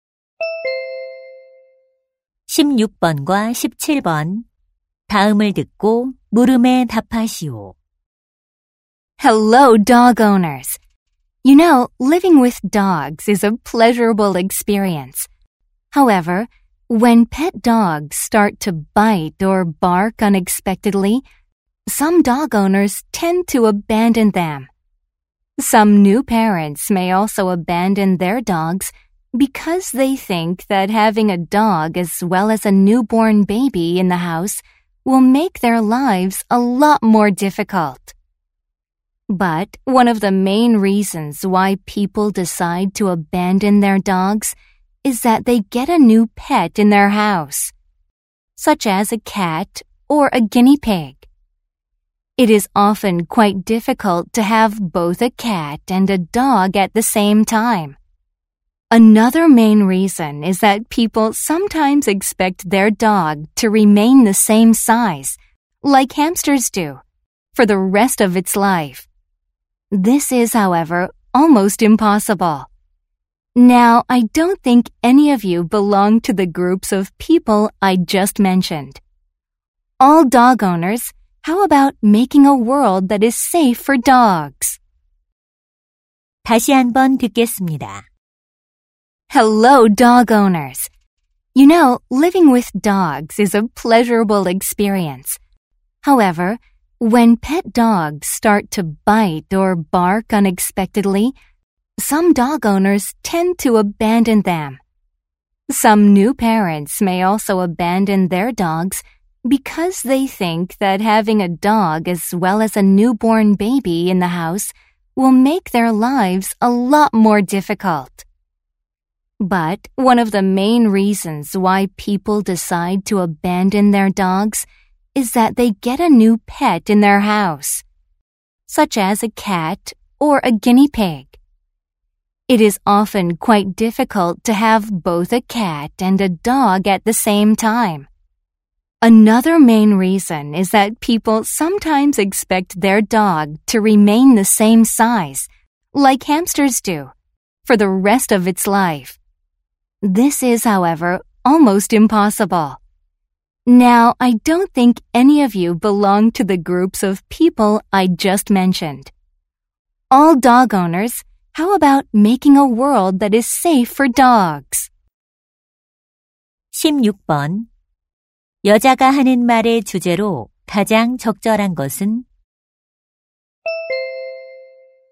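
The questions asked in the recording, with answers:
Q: 여자가 하는 말의 주제로 가장 적절한 것은?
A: 사람들이 개를 버리는 이유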